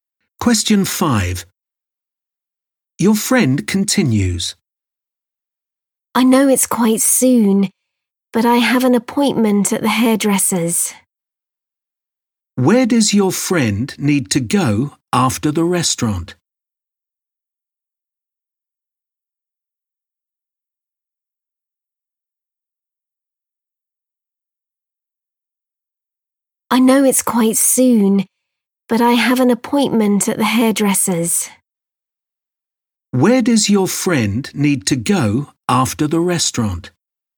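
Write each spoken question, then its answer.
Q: Where does your friend need to go after the restaurant?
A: The hairdresser's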